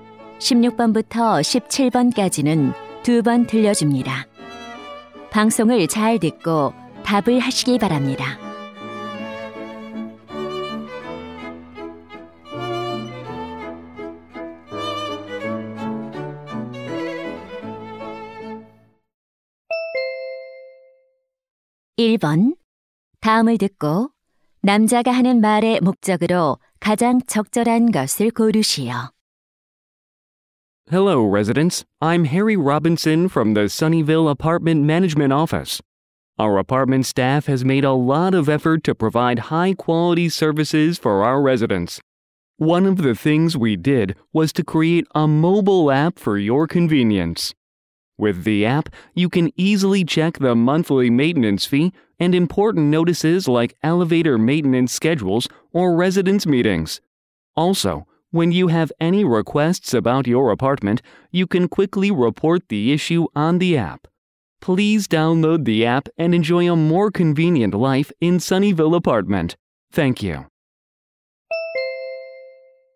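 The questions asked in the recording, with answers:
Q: 다음을 듣고 남자가 하는 말의 목적으로 가장 적절한 것을 고르시오.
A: 아파트 모바일 앱 이용을 홍보하려고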